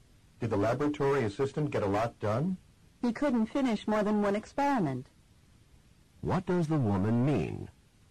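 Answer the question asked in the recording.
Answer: He finished only one experiment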